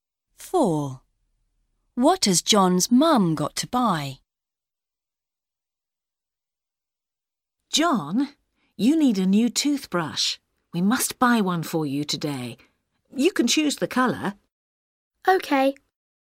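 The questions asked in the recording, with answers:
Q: What has John's mum got to buy?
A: A new toothbrush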